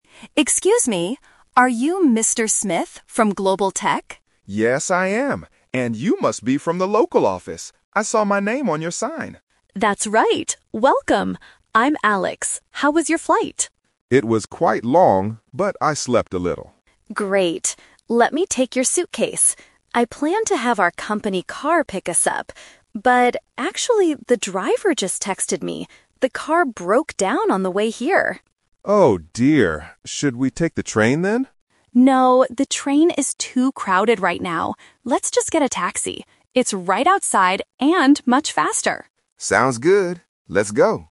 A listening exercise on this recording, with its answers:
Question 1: How did Mr. Smith know Alex was waiting for him?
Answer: He saw his name on a sign.

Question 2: What happened to the company car?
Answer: It broke down.

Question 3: How will they leave the airport?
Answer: By taxi.

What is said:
Alex: Excuse me, are you Mr. Smith from Global Tech?
Mr. Smith: Yes, I am. And you must be from the local office. I saw my name on your sign.
Alex: That's right. Welcome! I'm Alex. How was your flight?
Mr. Smith: It was quite long, but I slept a little.
Alex: Great. Let me take your suitcase. I planned to have our company car pick us up. But... actually, the driver just texted me. The car broke down on the way here.
Mr. Smith: Oh dear. Should we take the train then?
Alex: No, the train is too crowded right now. Let's just get a taxi. It's right outside and much faster.